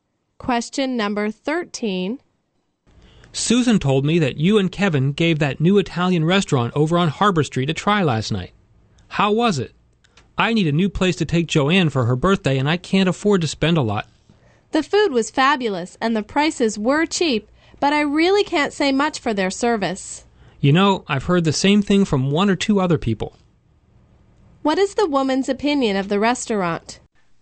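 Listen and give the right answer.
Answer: The food is great and cheap, but the service is poor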